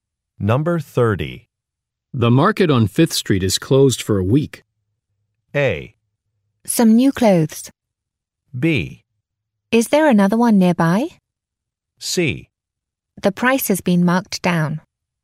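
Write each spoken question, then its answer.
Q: The market on 5th Street is closed for a week.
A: B: Is there another one nearby?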